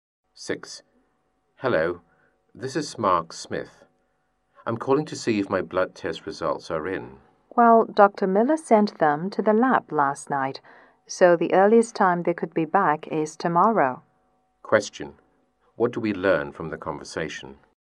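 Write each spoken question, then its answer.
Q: What do we learn from the conversation?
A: The blood test results will not be back until tomorrow at the earliest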